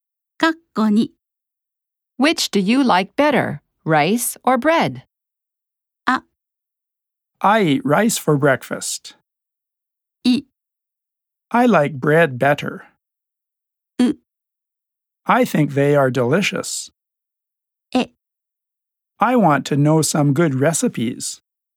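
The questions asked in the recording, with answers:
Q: Which do you like better, rice or bread?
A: い: I like bread better.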